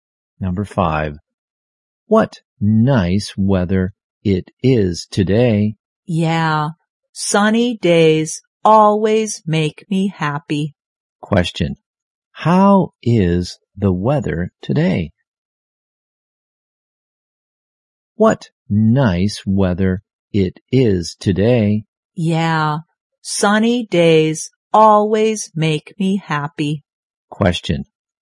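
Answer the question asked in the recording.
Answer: Sunny.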